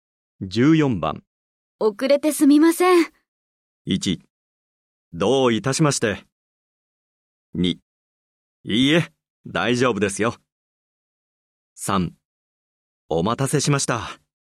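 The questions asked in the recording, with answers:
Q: 遅れてすみません。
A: 2: いいえ、大丈夫ですよ。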